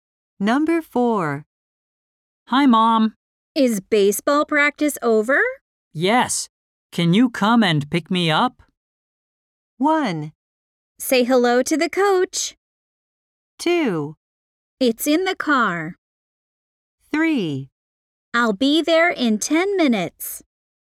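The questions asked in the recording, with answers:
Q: Yes. Can you come and pick me up?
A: 3: I'll be there in 10 minutes.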